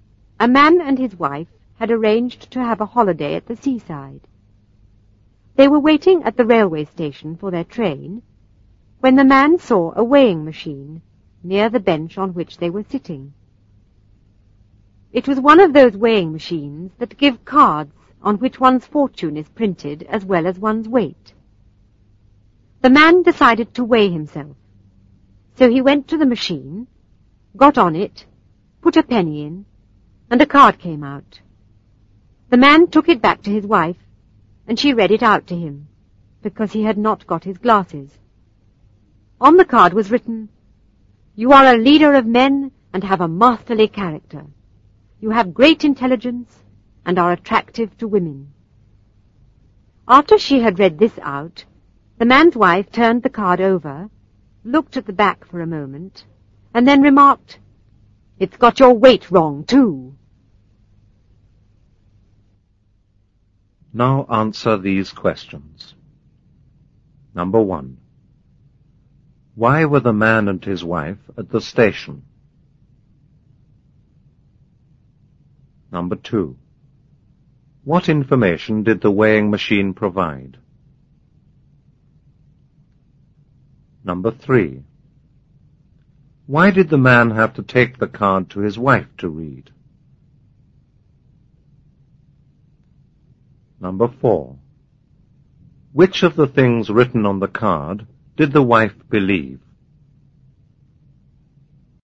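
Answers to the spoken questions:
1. They were waiting for their train to go on holiday at the seaside.
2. One's weight and one's fortune.
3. Because he had not got his glasses.
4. None of them.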